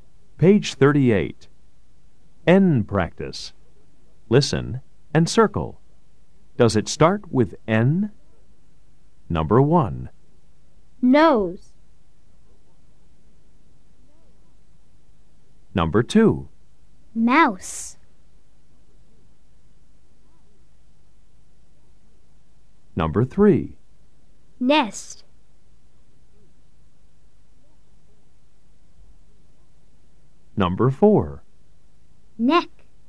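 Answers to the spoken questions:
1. Yes
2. No
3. Yes
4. Yes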